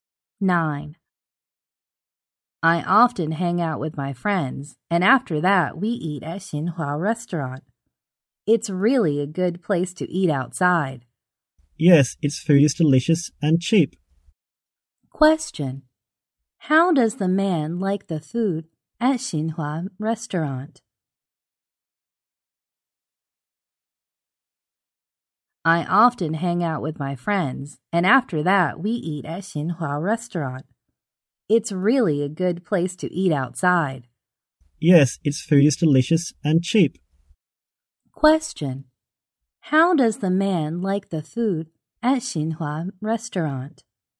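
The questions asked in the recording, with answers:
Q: How does the man like the food at Xinhua Restaurant?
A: Delicious and cheap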